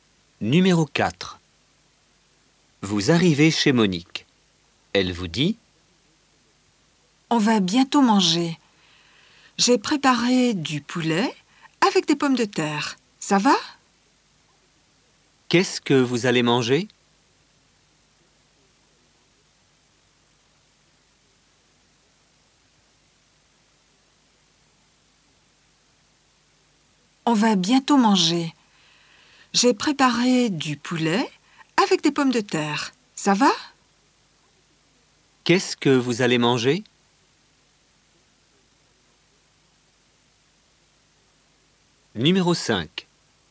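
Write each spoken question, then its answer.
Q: Qu'est-ce que vous allez manger?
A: Du poulet avec des pommes de terre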